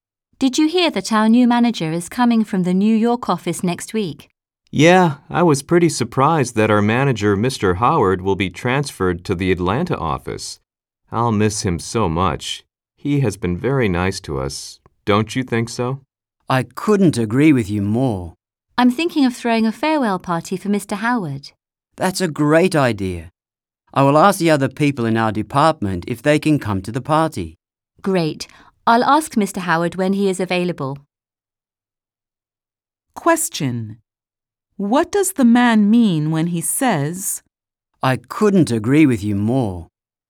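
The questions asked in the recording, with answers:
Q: What does the man mean when he says, I couldn't agree with you more?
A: He completely agrees that Mr. Howard has been very nice to them.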